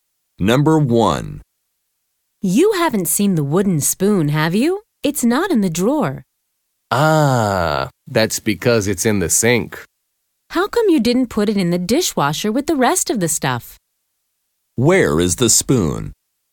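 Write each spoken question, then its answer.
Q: Where is the spoon?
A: In the sink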